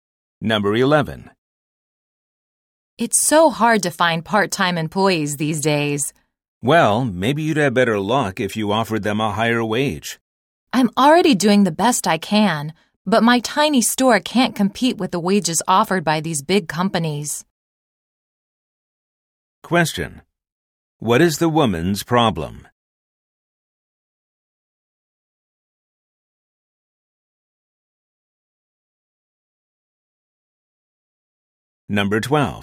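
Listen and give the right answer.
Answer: She can't find part-time employees because her small store can't pay wages as high as big companies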